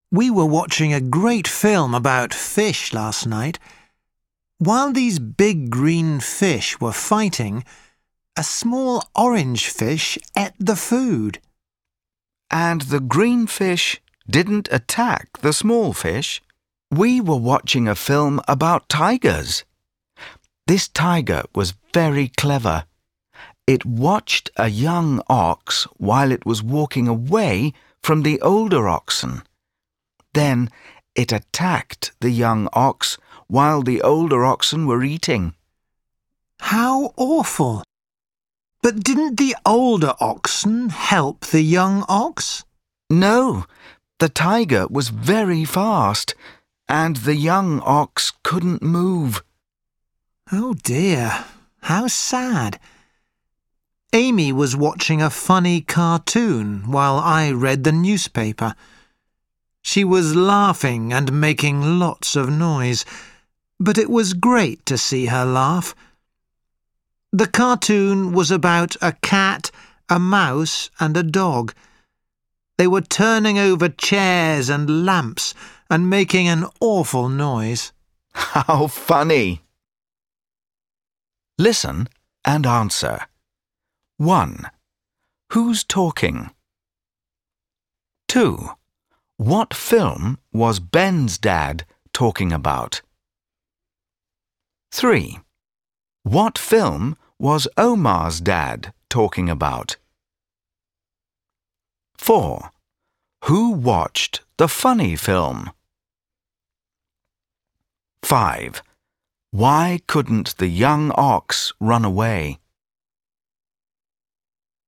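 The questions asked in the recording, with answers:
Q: Who watched the funny film?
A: Amy

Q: Why couldn't the young ox run away?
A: The tiger was very fast and the young ox couldn't move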